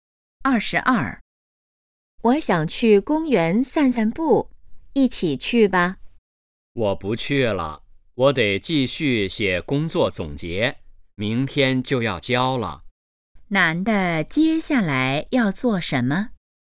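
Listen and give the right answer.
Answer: 写工作总结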